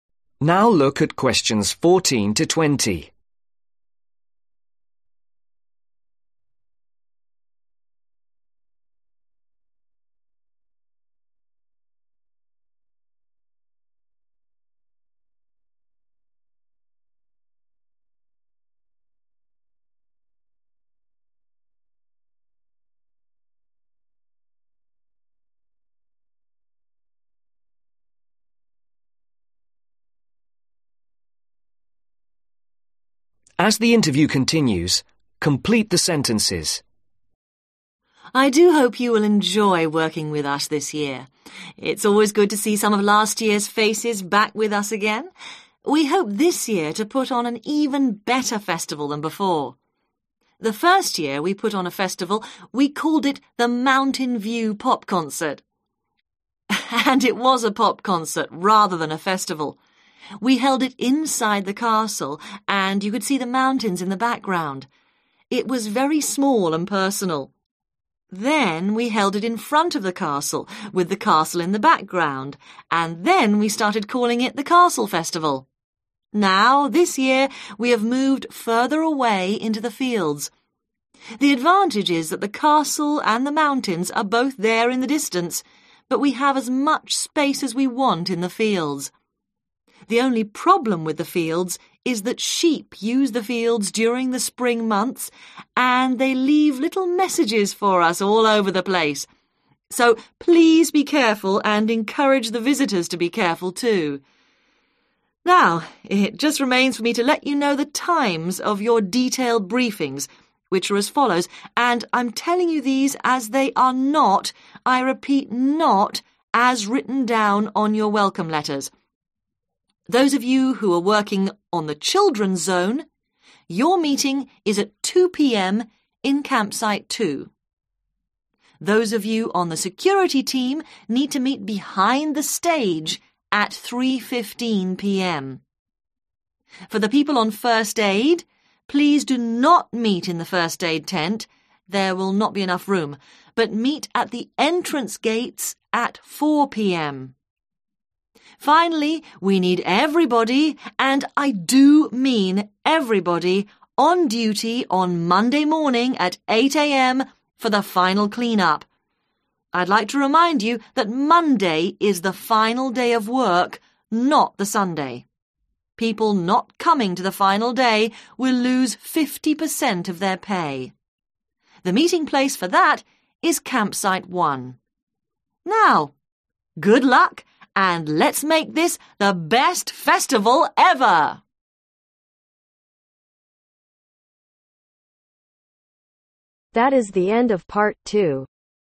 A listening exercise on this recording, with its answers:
Complete the sentences below. Write NO MORE THAN TWO WORDS AND/OR A NUMBER for each answer.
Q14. In the first year, it was a ............, and not a real festival.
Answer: Pop concert

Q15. Shortly afterwards the event was moved, and the ............ was in the background.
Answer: Castle

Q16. Now the festival is held in the ............ .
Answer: Fields

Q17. (17)............ p.m.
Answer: 3.15

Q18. (18) At the ............ .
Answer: Entrance Gates

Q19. (19)............ a.m.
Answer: 8

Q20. (20)............ .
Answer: Campsite 1